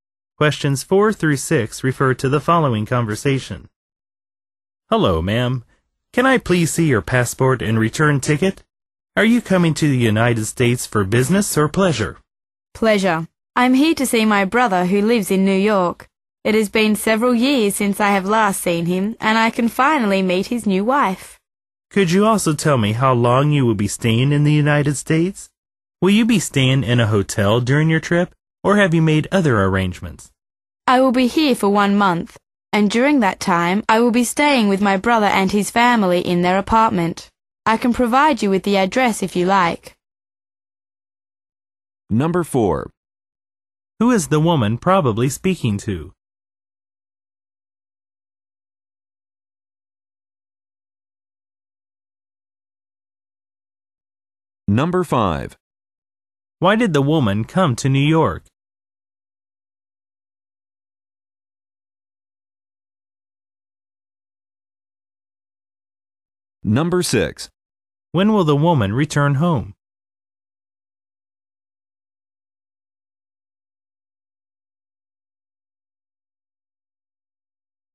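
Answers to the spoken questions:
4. An immigration officer
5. To visit her brother
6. In one month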